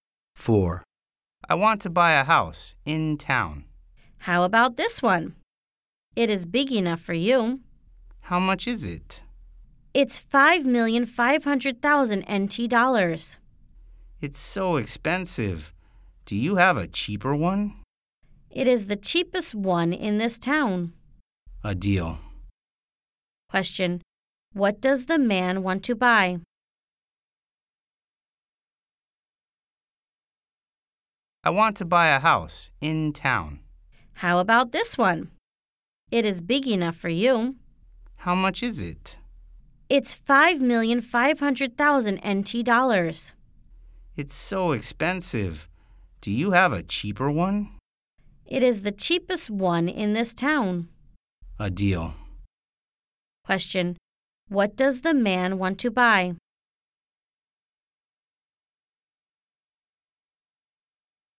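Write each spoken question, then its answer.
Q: What does the man want to buy?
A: A house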